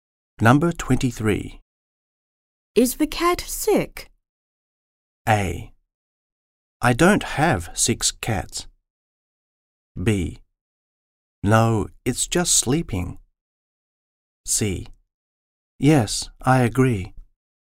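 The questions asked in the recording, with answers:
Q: Is the cat sick?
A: B: No, it's just sleeping.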